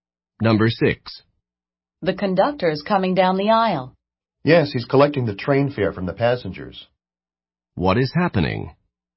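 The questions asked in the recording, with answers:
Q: What is happening?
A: The conductor is collecting train fares from the passengers.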